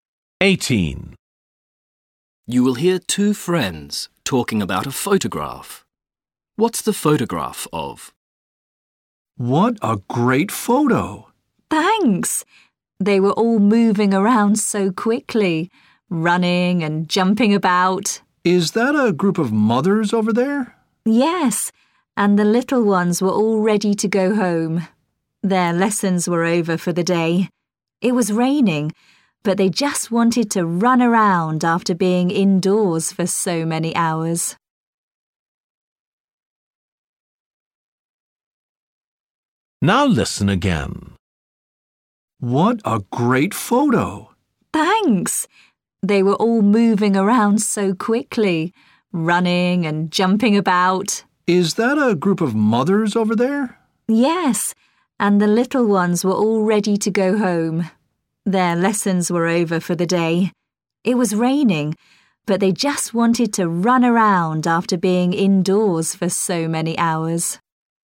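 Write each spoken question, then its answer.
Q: What's the photograph of?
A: young children running around after school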